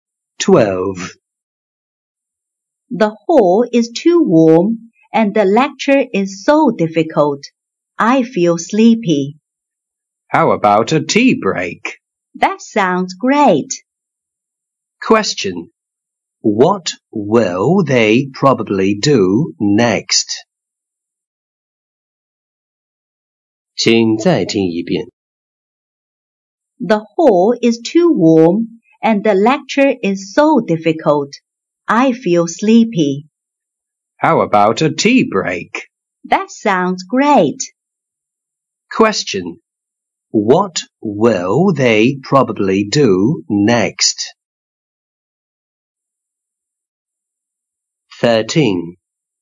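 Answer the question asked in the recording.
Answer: Have a tea break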